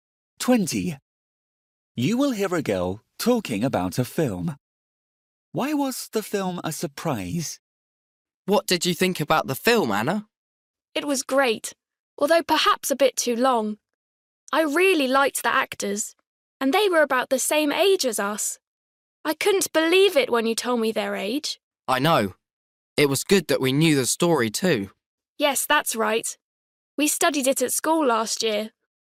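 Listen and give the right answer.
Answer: The actors were about the same age as them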